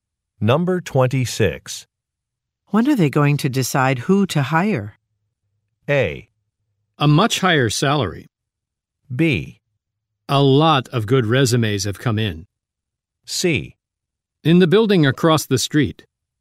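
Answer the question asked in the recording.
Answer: B: A lot of good resumes have come in.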